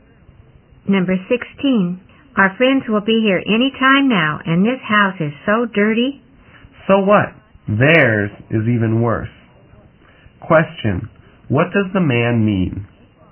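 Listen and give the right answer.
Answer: Their friends' house is even dirtier, so it doesn't matter.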